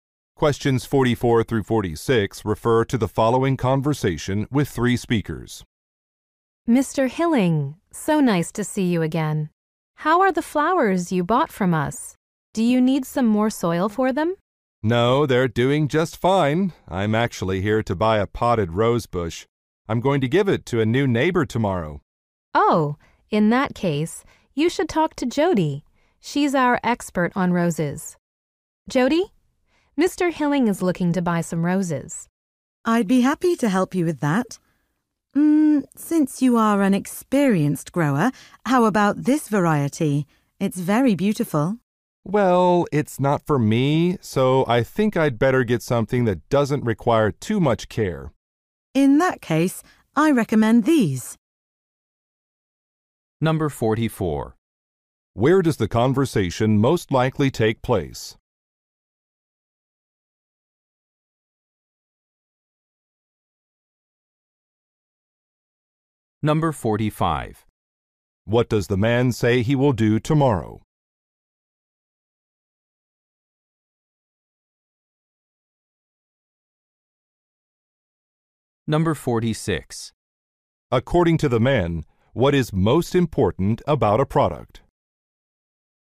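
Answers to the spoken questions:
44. At a garden center
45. Give a rose bush to a new neighbor
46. It should not require much care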